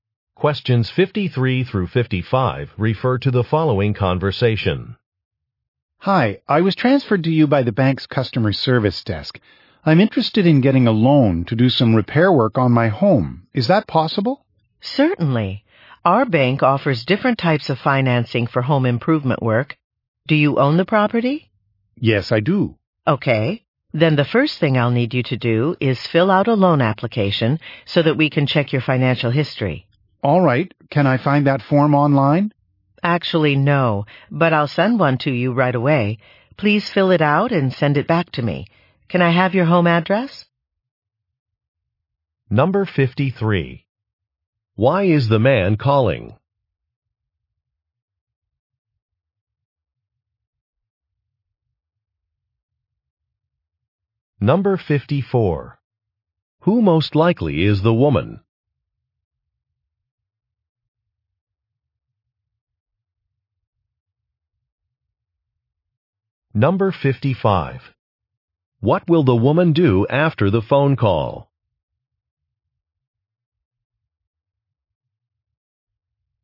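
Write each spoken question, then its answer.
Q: Why is the man calling?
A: To get a loan for home repairs

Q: Who most likely is the woman?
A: A bank loan officer

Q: What will the woman do after the phone call?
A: Send him a loan application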